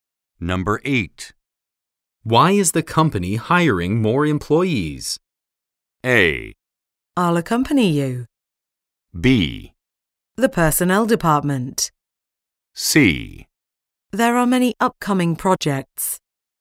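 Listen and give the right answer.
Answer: C: There are many upcoming projects.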